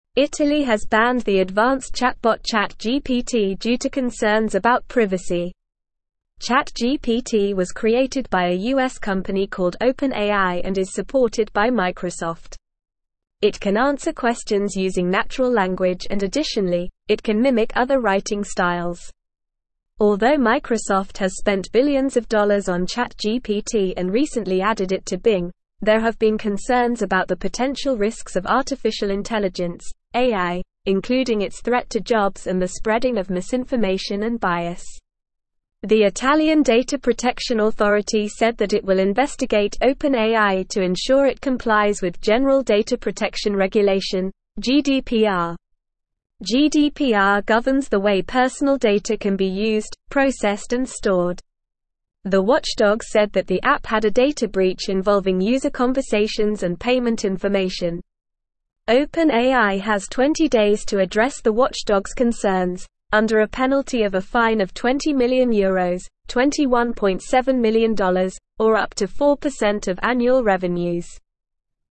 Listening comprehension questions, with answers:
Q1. What is ChatGPT?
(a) A type of car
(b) A type of food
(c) An advanced chatbot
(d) A type of animal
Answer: An advanced chatbot

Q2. Who created ChatGPT?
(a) Apple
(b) OpenAI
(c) Google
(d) Amazon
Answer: OpenAI

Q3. What can ChatGPT do?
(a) Answer questions using natural language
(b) Fly like a bird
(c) Predict the weather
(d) Cook food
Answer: Answer questions using natural language

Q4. Why did Italy ban ChatGPT?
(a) It was too expensive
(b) It was too slow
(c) It was a threat to privacy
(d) It was too small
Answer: It was a threat to privacy

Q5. What does GDPR stand for?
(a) General Data Protection Regulation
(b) Great Dog Park Rules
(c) Global Dance Party Revolution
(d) Giant Dinosaur Protection Rule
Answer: General Data Protection Regulation

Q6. What is the job of the Italian data-protection authority?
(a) To investigate OpenAI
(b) To sell ChatGPT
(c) To create a new chatbot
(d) To promote artificial intelligence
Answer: To investigate OpenAI

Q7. What was the data breach involving ChatGPT?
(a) User conversations and payment information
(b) User locations and phone numbers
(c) User birthdays and email addresses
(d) User favorite colors and hobbies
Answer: User conversations and payment information

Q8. What is the penalty for OpenAI if it does not address the watchdog's concerns?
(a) A fine of €20 million ($21.7m) or up to 4% of annual revenues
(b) A fine of €5 ($5.43)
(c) A free trip to Italy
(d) A promotion for ChatGPT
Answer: A fine of €20 million ($21.7m) or up to 4% of annual revenues

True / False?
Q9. Italy has allowed ChatGPT to be used in the country.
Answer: False

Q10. ChatGPT is a chatbot that can answer questions in natural language.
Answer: True

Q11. Microsoft has spent billions of dollars on ChatGPT.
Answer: True

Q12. ChatGPT is not supported by Microsoft.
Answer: False

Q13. There are concerns about the potential risks of artificial intelligence.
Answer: True

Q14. The Italian data-protection authority will investigate OpenAI to ensure compliance with GDPR.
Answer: True

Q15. GDPR governs the way personal data can be used, processed and stored.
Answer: True

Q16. OpenAI does not have to address the watchdog's concerns within 20 days.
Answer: False

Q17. Italy has banned the advanced chatbot ChatGPT due to concerns about (1)________.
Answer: privacy

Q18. ChatGPT was created by a US company called OpenAI and is supported by (2)________.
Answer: Microsoft

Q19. It can answer questions using natural language and additionally, it can mimic other writing (3)________.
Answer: styles

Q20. including its threat to jobs and the spreading of (4)________ and (5)________.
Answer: misinformation

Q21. including its threat to jobs and the spreading of (4)________ and (5)________.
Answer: bias

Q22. GDPR governs the way personal (6)________ can be used, processed and stored.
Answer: data

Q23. The watchdog said that the app had a data breach involving user conversations and (7)________ information.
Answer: payment

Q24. OpenAI has 20 days to address the watchdog's concerns, under a penalty of a fine of €20 million ($21.7m) or up to 4% of (8)________ revenues.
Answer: annual

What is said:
Italy has banned the advanced chatbot ChatGPT due to concerns about privacy. ChatGPT was created by a US company called OpenAI and is supported by Microsoft. It can answer questions using natural language and additionally, it can mimic other writing styles. Although Microsoft has spent billions of dollars on ChatGPT and recently added it to Bing, there have been concerns about the potential risks of artificial intelligence (AI), including its threat to jobs and the spreading of misinformation and bias. The Italian data-protection authority said that it will investigate OpenAI to ensure it complies with General Data Protection Regulation (GDPR). The watchdog said that the app had a data breach involving user conversations and payment information. OpenAI has 20 days to address the watchdog's concerns, under a penalty of a fine of €20 million ($21.7m) or up to 4% of annual revenues.

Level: Level 1

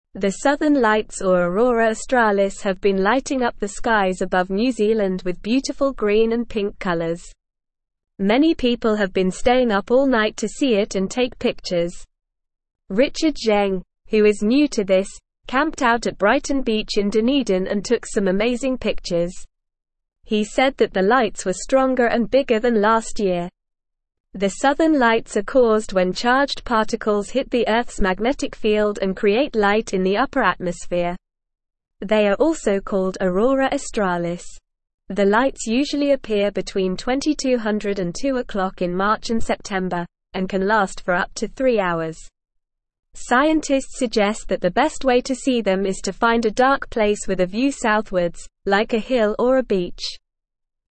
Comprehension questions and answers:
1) The Southern Lights or Aurora Australis have been (1)________ up the skies above New Zealand with beautiful green and pink colors.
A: lighting

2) Many people have been staying up all (2)_______ to see it and take pictures.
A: night

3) Richard Zheng, who is new to this, camped out at Brighton Beach in Dunedin and took some amazing (3)________.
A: pictures

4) The Southern Lights are caused when charged (4)________ hit the Earth's magnetic field and create light in the upper atmosphere.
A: particles

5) Scientists suggest that the best way to see them is to find a dark (5)________ with a view southwards, like a hill or a beach.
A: place

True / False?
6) The Northern Lights have been lighting up the skies above New Zealand.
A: False

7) Many people are staying up all night to see the Southern Lights.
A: True

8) Richard Zheng took pictures of the Southern Lights at Brighton Beach.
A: True

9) The Southern Lights are caused by the sun hitting the Earth's magnetic field.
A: False

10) The Southern Lights are also called Aurora Australis.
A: True

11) The lights usually appear between 22:00 and 02:00 in March and September.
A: True

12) Scientists suggest that the best way to see the lights is to find a dark place with a view southwards.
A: True

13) The Southern Lights can last for up to eight hours.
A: False

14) What are the Southern Lights also called?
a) Northern Lights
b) Aurora Australis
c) Green and Pink Lights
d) New Zealand Lights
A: Aurora Australis

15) What causes the Southern Lights?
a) Rain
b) Sunlight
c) Charged particles hitting Earth's magnetic field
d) Earth's rotation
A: Charged particles hitting Earth's magnetic field

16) Where did Richard Zheng take pictures of the Southern Lights?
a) Brighton Beach in Dunedin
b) Auckland City Center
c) Wellington Harbor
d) Christchurch Botanic Gardens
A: Brighton Beach in Dunedin

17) How long can the Southern Lights last for?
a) Up to 30 minutes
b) Up to 1 hour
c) Up to 2 hours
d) Up to 3 hours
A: Up to 3 hours

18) What is the best way to see the Southern Lights?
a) In a brightly lit city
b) In a crowded shopping mall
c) In a dark place with a view southwards, like a hill or a beach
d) In a museum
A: In a dark place with a view southwards, like a hill or a beach

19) Why do people stay up all night to see the Southern Lights?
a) To take pictures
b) To watch a movie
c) To play video games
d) To eat pizza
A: To take pictures

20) What are the Southern Lights?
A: The Southern Lights are colorful lights in the sky that can be seen in New Zealand.

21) What colors do the Southern Lights have?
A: The Southern Lights have green and pink colors.

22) Where did Richard Zheng take his pictures of the Southern Lights?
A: Richard Zheng took his pictures of the Southern Lights at Brighton Beach in Dunedin.

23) Were the Southern Lights stronger and bigger than last year according to Richard Zheng?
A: Yes, the Southern Lights were stronger and bigger than last year according to Richard Zheng.

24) What is the best way to see the Southern Lights according to scientists?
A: The best way to see the Southern Lights according to scientists is to find a dark place with a view southwards, like a hill or a beach.

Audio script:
The Southern Lights or Aurora Australis have been lighting up the skies above New Zealand with beautiful green and pink colors. Many people have been staying up all night to see it and take pictures. Richard Zheng, who is new to this, camped out at Brighton Beach in Dunedin and took some amazing pictures. He said that the lights were stronger and bigger than last year. The Southern Lights are caused when charged particles hit the Earth's magnetic field and create light in the upper atmosphere. They are also called Aurora Australis. The lights usually appear between 22:00 and 02:00 in March and September, and can last for up to three hours. Scientists suggest that the best way to see them is to find a dark place with a view southwards, like a hill or a beach.

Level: Level 1

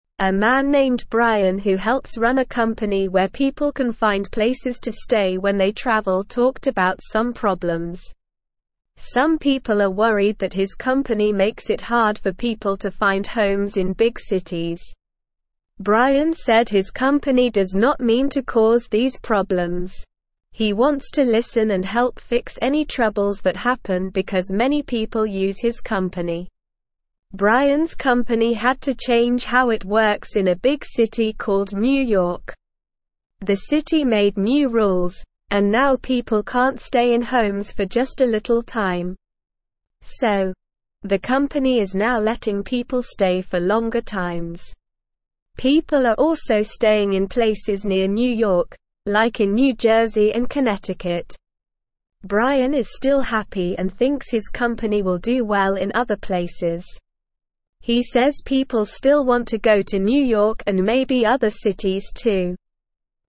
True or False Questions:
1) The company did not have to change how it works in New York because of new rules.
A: False

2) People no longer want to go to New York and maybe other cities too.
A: False

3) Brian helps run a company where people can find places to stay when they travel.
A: True

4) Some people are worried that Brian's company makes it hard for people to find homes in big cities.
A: True

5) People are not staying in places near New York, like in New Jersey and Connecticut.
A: False

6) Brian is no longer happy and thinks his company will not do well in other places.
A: False

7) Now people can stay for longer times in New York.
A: True

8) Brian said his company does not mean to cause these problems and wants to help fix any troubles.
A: True

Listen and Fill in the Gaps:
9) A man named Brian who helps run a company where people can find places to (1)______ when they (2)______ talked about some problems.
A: stay

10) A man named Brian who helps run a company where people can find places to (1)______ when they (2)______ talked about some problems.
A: travel

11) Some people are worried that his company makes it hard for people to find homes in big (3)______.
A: cities

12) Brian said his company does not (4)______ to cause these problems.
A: mean

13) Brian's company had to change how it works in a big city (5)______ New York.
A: called

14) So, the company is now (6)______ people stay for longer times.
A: letting

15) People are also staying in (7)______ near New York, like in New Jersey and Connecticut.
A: places

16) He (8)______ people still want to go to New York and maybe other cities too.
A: says

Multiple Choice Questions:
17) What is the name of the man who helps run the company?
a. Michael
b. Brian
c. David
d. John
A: Brian

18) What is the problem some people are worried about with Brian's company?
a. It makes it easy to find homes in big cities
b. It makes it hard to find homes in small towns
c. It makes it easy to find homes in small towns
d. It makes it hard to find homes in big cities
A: It makes it hard to find homes in big cities

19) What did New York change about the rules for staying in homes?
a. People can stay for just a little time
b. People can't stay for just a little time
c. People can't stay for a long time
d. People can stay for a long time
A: People can't stay for just a little time

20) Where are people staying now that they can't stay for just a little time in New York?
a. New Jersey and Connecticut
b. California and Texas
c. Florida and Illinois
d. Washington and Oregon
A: New Jersey and Connecticut

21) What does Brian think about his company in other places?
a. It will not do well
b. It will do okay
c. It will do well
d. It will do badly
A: It will do well

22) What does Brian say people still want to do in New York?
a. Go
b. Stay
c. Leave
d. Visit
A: Go

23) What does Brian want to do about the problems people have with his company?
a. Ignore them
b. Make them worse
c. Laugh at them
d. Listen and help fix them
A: Listen and help fix them

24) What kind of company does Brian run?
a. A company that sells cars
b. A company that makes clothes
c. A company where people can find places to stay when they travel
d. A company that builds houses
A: A company where people can find places to stay when they travel

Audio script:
A man named Brian who helps run a company where people can find places to stay when they travel talked about some problems. Some people are worried that his company makes it hard for people to find homes in big cities. Brian said his company does not mean to cause these problems. He wants to listen and help fix any troubles that happen because many people use his company.
Brian's company had to change how it works in a big city called New York. The city made new rules, and now people can't stay in homes for just a little time. So, the company is now letting people stay for longer times. People are also staying in places near New York, like in New Jersey and Connecticut. Brian is still happy and thinks his company will do well in other places. He says people still want to go to New York and maybe other cities too.

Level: Level 1

